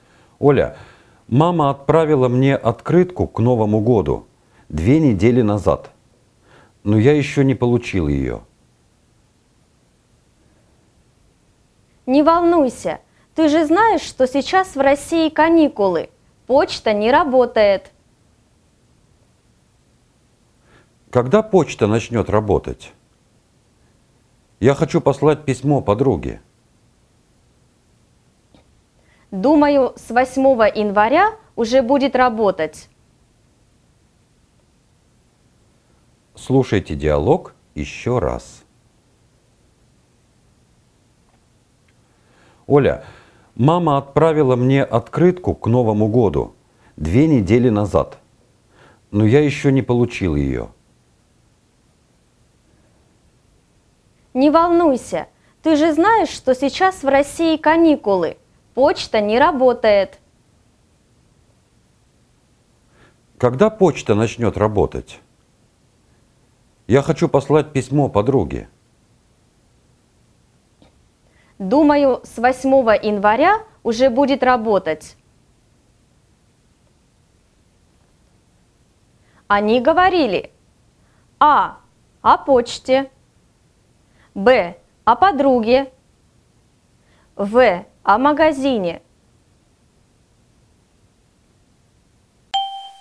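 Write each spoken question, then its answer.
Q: Они говорили: А. О почте. Б. О подруге. В. О магазине.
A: А: О почте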